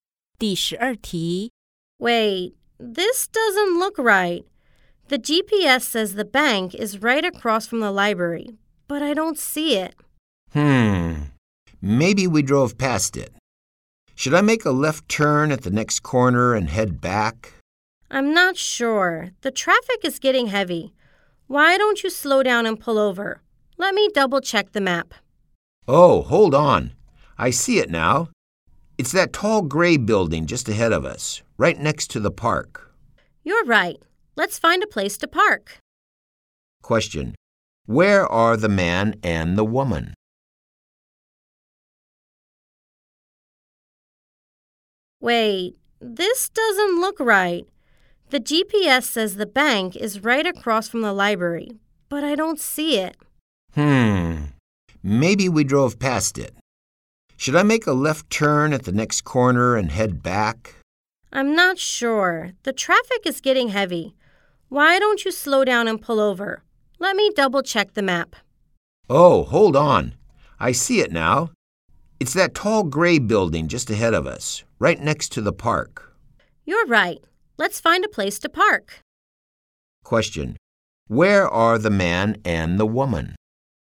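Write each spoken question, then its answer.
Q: Question. Where are the man and the woman?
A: In a car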